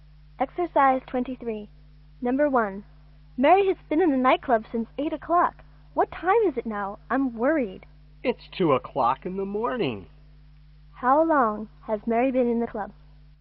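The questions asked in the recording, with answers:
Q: How long has Mary been in the club?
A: 6 hours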